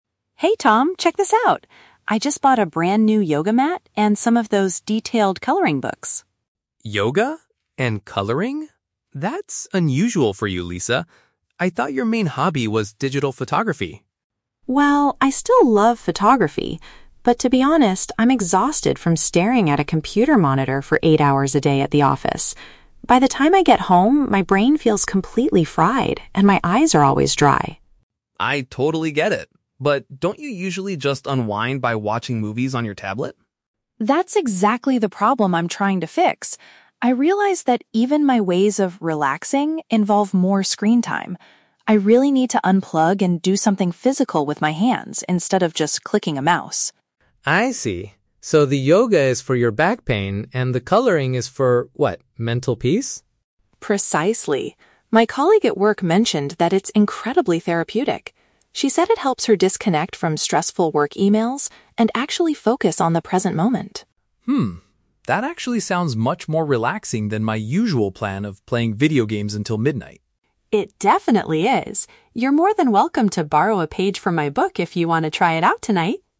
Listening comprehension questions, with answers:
Listen to the conversation between the two roommates (Lisa and Tom) and choose the best answer (A, B, or C).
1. What is the main reason Lisa bought the new items?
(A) She wants to prepare for a professional yoga competition.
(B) She wants to spend less time looking at electronic screens.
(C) She was bored with her old hobby of digital photography.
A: She wants to spend less time looking at electronic screens.

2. How does Lisa feel after a long day at work?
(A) She feels physically energetic but mentally bored.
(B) She suffers from dry eyes and feels mentally exhausted.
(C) She is annoyed because she has too many emails to answer at home.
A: She suffers from dry eyes and feels mentally exhausted.

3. What does Tom usually do to relax in the evening?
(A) He practices yoga with his colleagues.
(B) He engages in activities that involve digital devices.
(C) He helps Lisa find therapeutic ways to disconnect.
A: He engages in activities that involve digital devices.

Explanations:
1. Lisa says she wants to avoid more "screen time" and needs to "unplug" because she already stares at a monitor all day at work.
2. Lisa uses the words "my brain feels completely fried" (mentally exhausted) and "my eyes are always dry."
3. Tom mentions that his usual plan is "playing video games until midnight," and Lisa mentions he usually watches movies on a tablet. Both are digital activities.

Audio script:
Lisa: Hey Tom, check this out! I just bought a brand-new yoga mat and some of those detailed coloring books.
Tom: Yoga? And coloring? That's... unusual for you, Lisa. I thought your main hobby was digital photography.
Lisa: Well, I still love photography, but to be honest, I'm exhausted from staring at a computer monitor for eight hours a day at the office. By the time I get home, my brain feels completely fried and my eyes are always dry.
Tom: I totally get it. But don't you usually just unwind by watching movies on your tablet?
Lisa: That's exactly the problem I'm trying to fix! I realized that even my ways of "relaxing" involve more screen time. I really need to unplug and do something physical with my hands instead of just clicking a mouse.
Tom: I see. So, the yoga is for your back pain and the coloring is for... what? Mental peace?
Lisa: Precisely. My colleague at work mentioned that it's incredibly therapeutic. She said it helps her disconnect from stressful work emails and actually focus on the present moment.
That actually sounds much more relaxing than my usual plan of playing video games until midnight.
Lisa: It definitely is! You're more than welcome to borrow a page from my book if you want to try it out tonight.

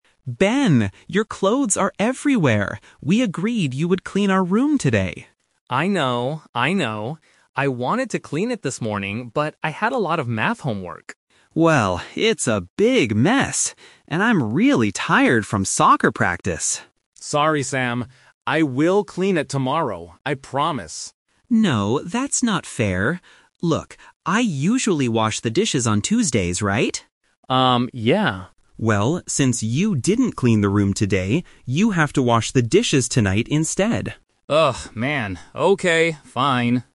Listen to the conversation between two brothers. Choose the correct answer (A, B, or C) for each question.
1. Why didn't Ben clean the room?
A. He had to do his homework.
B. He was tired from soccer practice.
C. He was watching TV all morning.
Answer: He had to do his homework.

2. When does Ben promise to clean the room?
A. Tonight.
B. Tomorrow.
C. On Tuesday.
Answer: Tomorrow.

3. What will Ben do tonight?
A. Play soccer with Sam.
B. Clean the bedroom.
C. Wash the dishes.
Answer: Wash the dishes.

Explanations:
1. Ben clearly says he didn't clean the room because "I had a lot of math homework." Option (B) is a trap because it was Sam who was tired from soccer practice, not Ben. Option (C) is plausible for a lazy brother, but it is not mentioned in the audio.
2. Ben says to his brother, "I will clean it tomorrow, I promise." Option (A) is a trap because tonight he has to do something else (wash the dishes). Option (C) is a trap because Tuesday is Sam's usual day for washing dishes.
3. This is "The Twist". Sam usually washes the dishes on Tuesdays. However, because Ben didn't clean the room, Sam tells him: "you have to wash the dishes tonight instead". Option (B) is a trap because Ben will clean the room tomorrow, not tonight. Option (A) is not mentioned.

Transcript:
Sam: Ben, your clothes are everywhere! We agreed you would clean our room today.
Ben: I know, I know. I wanted to clean it this morning, but I had a lot of math homework.
Sam: Well, it's a big mess. And I'm really tired from soccer practice.
Ben: Sorry, Sam. I will clean it tomorrow, I promise.
Sam: No, that's not fair. Look, I usually wash the dishes on Tuesdays, right?
Sam: Well, since you didn't clean the room today, you have to wash the dishes tonight instead.

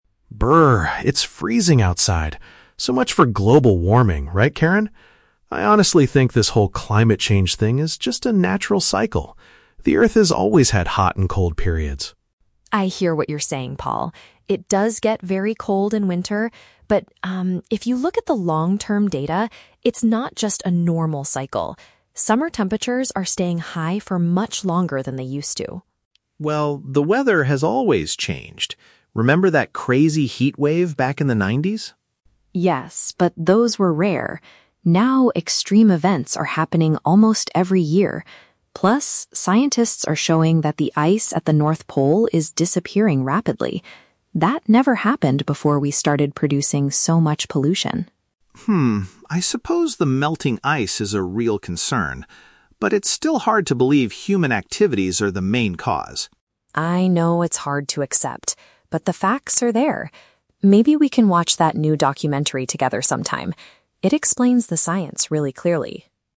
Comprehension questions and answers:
Listen to a conversation between two colleagues and choose the correct answer (A, B, or C) for each question.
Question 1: What is Paul's initial opinion about climate change?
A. He thinks it is causing the extremely cold winter.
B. He believes it is simply a regular pattern of nature.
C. He feels it is the biggest threat to our modern society.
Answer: He believes it is simply a regular pattern of nature.

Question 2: What evidence does Karen use to support her argument?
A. The frequent heatwaves that happened in the 1990s.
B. The rising sea levels that are threatening coastal cities.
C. The fact that the warm season is lasting longer.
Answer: The fact that the warm season is lasting longer.

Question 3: How does the conversation end?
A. Karen suggests viewing an educational film together.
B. Paul completely agrees that humans are causing the issue.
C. Karen decides to stop discussing the topic with Paul.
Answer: Karen suggests viewing an educational film together.

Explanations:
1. Paul says that climate change is "just a natural cycle" and that the earth has always had hot and cold periods. (Paraphrasing: regular pattern of nature = natural cycle).
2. Karen argues that "Summer temperatures are staying high for much longer than they used to." (Paraphrasing: warm season = Summer temperatures; lasting longer = staying high for much longer).
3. At the end of the conversation, Karen says, "Maybe we can watch that new documentary together sometime.

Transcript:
Paul: Brrr, it's freezing outside! So much for global warming, right, Karen? I honestly think this whole climate change thing is just a natural cycle. The earth has always had hot and cold periods.
Karen: I hear what you're saying, Paul. It does get very cold in winter. But um, if you look at the long-term data, it's not just a normal cycle. Summer temperatures are staying high for much longer than they used to.
Paul: Well, the weather has always changed. Remember that crazy heatwave back in the 90s?
Karen: Yes, but those were rare. Now, extreme events are happening almost every year. Plus, scientists are showing that the ice at the North Pole is disappearing rapidly. That never happened before we started producing so much pollution.
Paul: Hmm, I suppose the melting ice is a real concern. But it's still hard to believe human activities are the main cause.
Karen: I know it's hard to accept, but the facts are there. Maybe we can watch that new documentary together sometime. It explains the science really clearly.

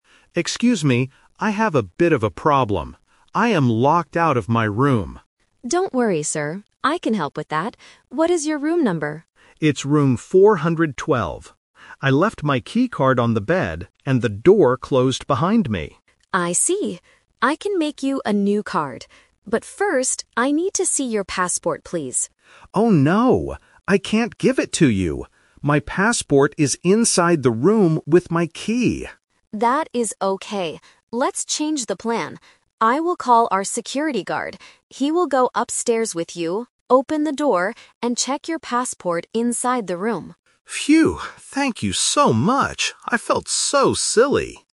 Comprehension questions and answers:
Listen to a guest talking to a hotel receptionist. Choose the correct answer (A, B, or C) for each question.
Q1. What is the guest's problem?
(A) He cannot find his room.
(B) He left his keycard inside his room.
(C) He lost his wallet in the hotel.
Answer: He left his keycard inside his room.

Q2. What does the receptionist ask to see first?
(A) The guest's passport.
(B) The old keycard.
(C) A credit card.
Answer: The guest's passport.

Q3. How do they solve the problem? (The Twist)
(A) The receptionist gives him a new key immediately.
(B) The guest waits in the lobby for his friend.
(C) A security guard goes to the room with the guest.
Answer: A security guard goes to the room with the guest.

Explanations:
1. The guest clearly explains his situation: "I am locked out of my room... I left my keycard on the bed..."
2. Before making a new key, the receptionist says, "But first, I need to see your passport, please."
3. This is the Twist. Because the passport is also locked inside, the receptionist changes the normal plan. She says, "I will call our security guard. He will go upstairs with you, open the door..."

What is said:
Guest: Excuse me. I have a bit of a problem. I am locked out of my room.
Receptionist: Don't worry, sir. I can help with that. What is your room number?
Guest: It's room 412. I left my keycard on the bed, and the door closed behind me.
Receptionist: I see. I can make you a new card. But first, I need to see your passport, please.
Guest: Oh no! I can't give it to you. My passport is inside the room with my key!
Receptionist: That is okay. Let's change the plan. I will call our security guard. He will go upstairs with you, open the door, and check your passport inside the room.

